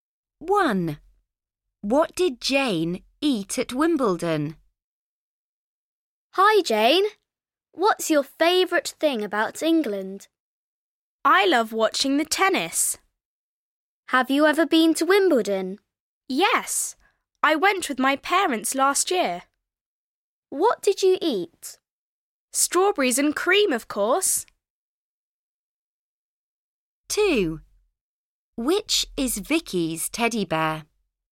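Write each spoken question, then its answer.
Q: What did Jane eat at Wimbledon?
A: Strawberries and cream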